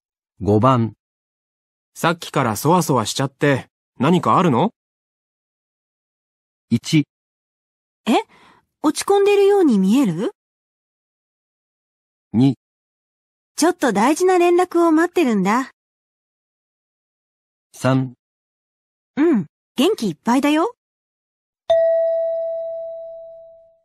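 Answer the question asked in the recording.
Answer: 2: ちょっと大事な連絡を待ってるんだ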